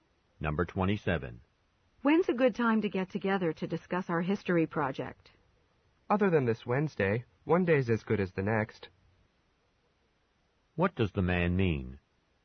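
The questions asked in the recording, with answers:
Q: What does the man mean?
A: Any day except Wednesday is fine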